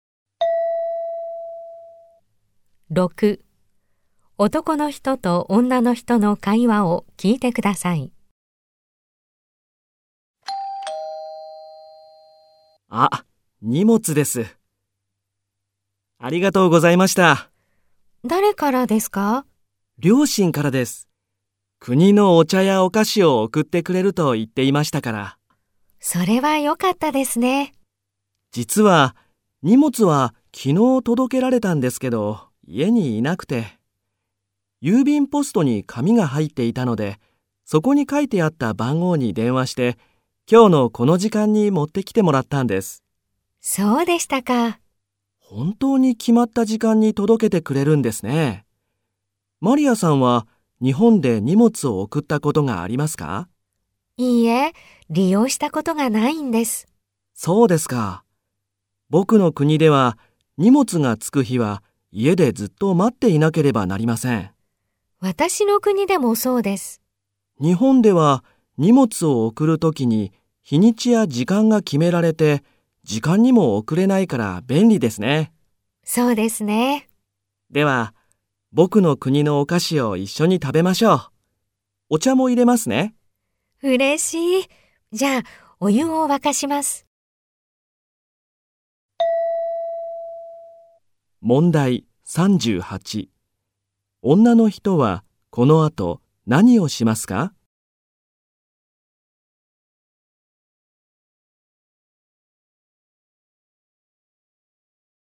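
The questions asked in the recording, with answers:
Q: 女の人はこの後何をしますか?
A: お湯を沸かします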